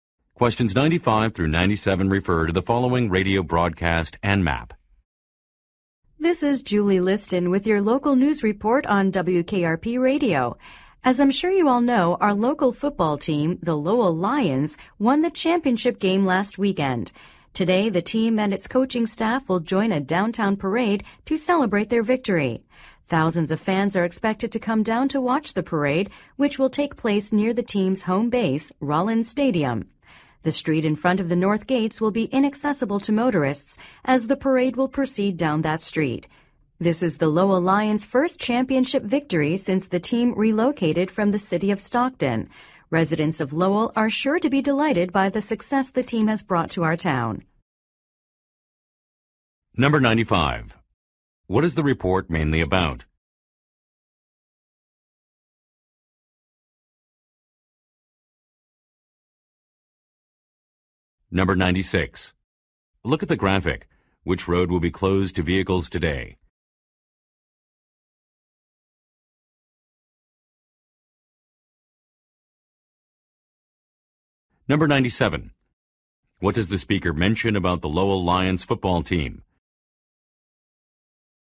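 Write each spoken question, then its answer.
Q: What is the report mainly about?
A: A parade celebrating the local team's championship win

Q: What does the speaker mention about the Lowell Lions football team?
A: It moved from Stockton, and this is its first championship since then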